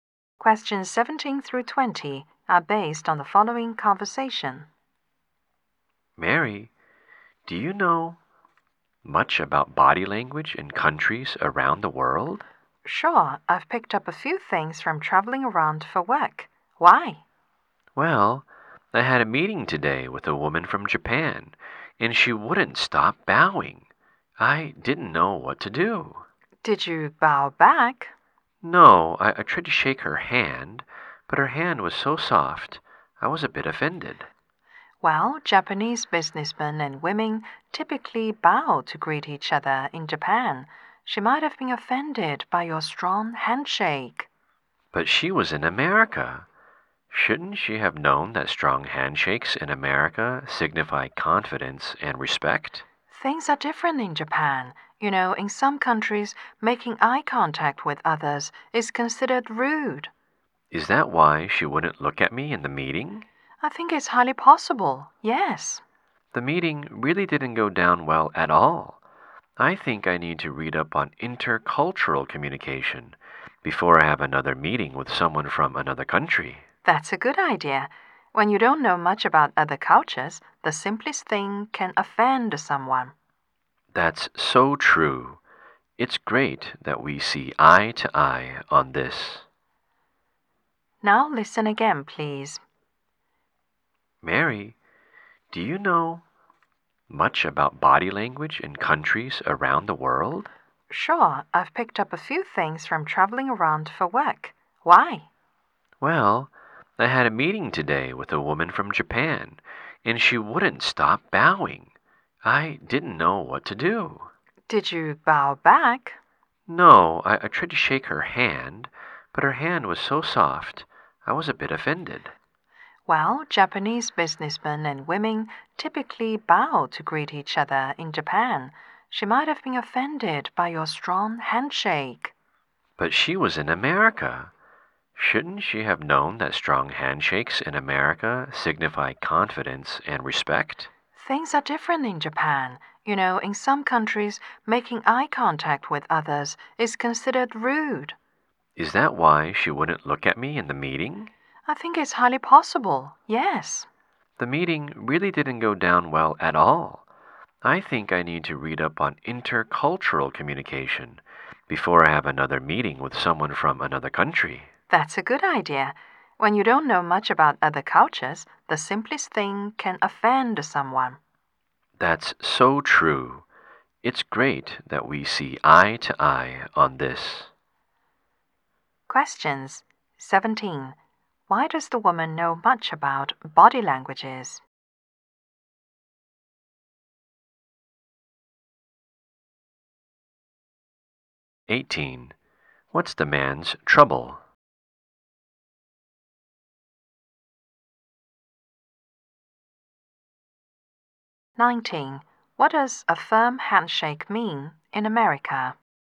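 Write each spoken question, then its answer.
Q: Why does the woman know much about body languages?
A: She has traveled around for work

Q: What's the man's trouble?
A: He didn't know how to respond to a Japanese woman's body language in a meeting

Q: What does a firm handshake mean in America?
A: Confidence and respect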